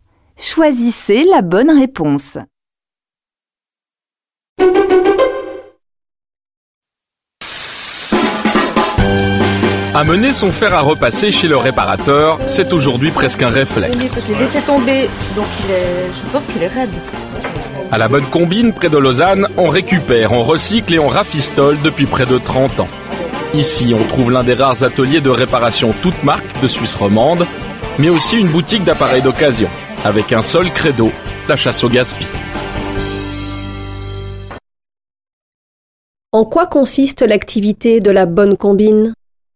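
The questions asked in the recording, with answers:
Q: En quoi consiste l'activité de la bonne combine ?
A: Récupérer, recycler et réparer des appareils (atelier de réparation toutes marques et boutique d'occasion) pour lutter contre le gaspillage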